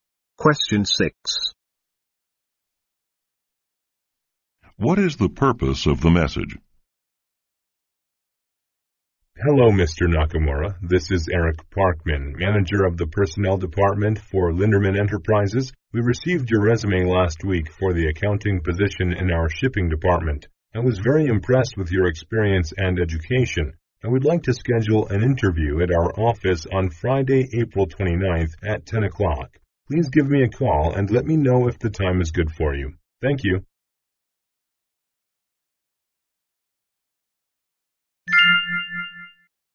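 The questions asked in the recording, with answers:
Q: What is the purpose of the message?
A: To schedule a job interview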